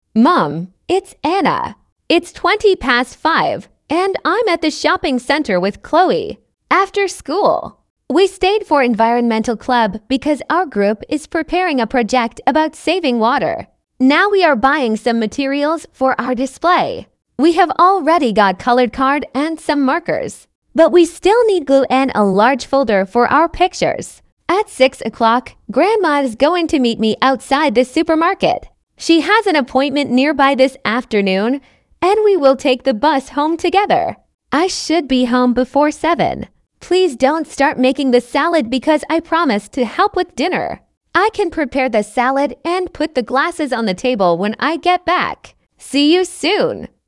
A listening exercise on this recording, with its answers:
Прослушайте текст и определите, какие из приведённых утверждений A–E соответствуют содержанию текста — 1 (True), а какие не соответствуют — 2 (False). Вы услышите текст дважды.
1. Anna is calling from the sports centre.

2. Anna stayed after school for an environmental club meeting.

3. Anna and Chloe have already bought everything for their project.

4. Anna is going to meet her grandmother later today.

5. Anna plans to help prepare dinner when she gets home.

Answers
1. False
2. True
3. False
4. True
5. True

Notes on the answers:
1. Анна звонит из торгового центра, а не из спортивного центра.
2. После школы Анна осталась на занятии экологического кружка.
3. Девочки уже купили цветной картон и маркеры, но им всё ещё нужны клей и большая папка.
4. В шесть часов Анна собирается встретиться со своей бабушкой.
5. Анна обещала помочь с ужином: приготовить салат и поставить стаканы на стол.

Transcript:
After school, we stayed for environmental club because our group is preparing a project about saving water.
Now we are buying some materials for our display. We have already got coloured card and some markers, but we still need glue and a large folder for our pictures.
At six o'clock, Grandma is going to meet me outside the supermarket. She has an appointment nearby this afternoon, and we will take the bus home together.
I should be home before seven. Please don't start making the salad because I promised to help with dinner. I can prepare the salad and put the glasses on the table when I get back.
See you soon.

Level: 10kl